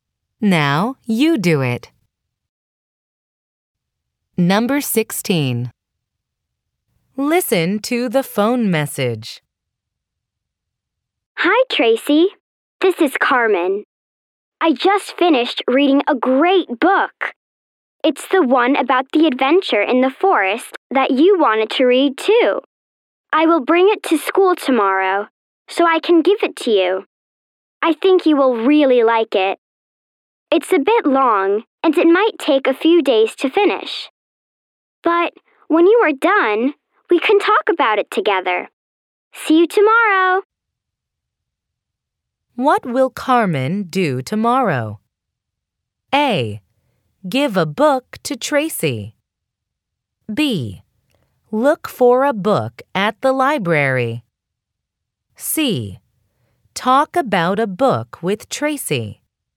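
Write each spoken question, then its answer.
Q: What will Carmen do tomorrow?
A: A: Give a book to Tracy.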